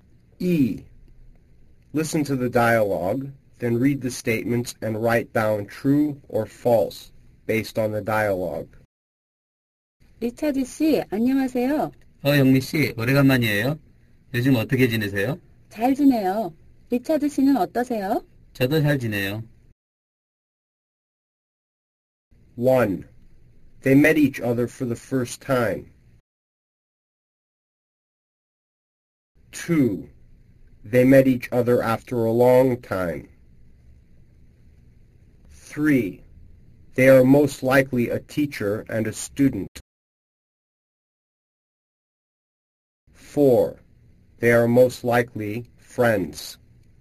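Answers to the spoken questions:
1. False
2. True
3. False
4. True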